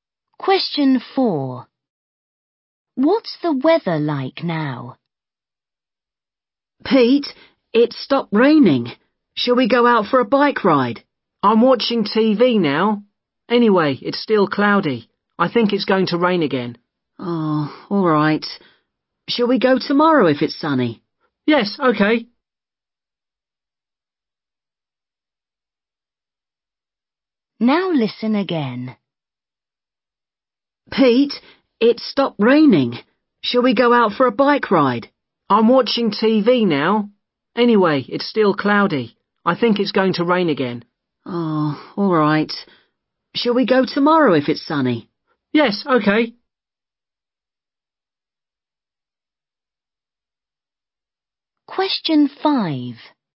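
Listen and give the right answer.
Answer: Cloudy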